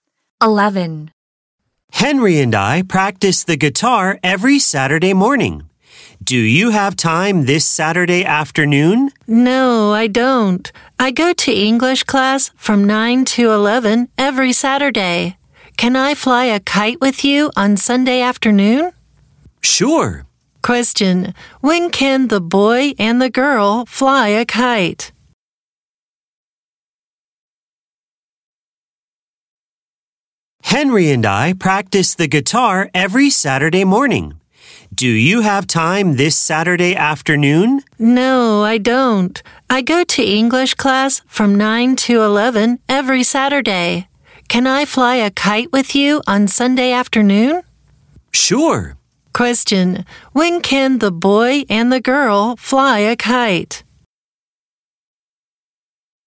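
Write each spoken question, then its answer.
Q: Question, when can the boy and the girl fly a kite?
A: On Sunday afternoon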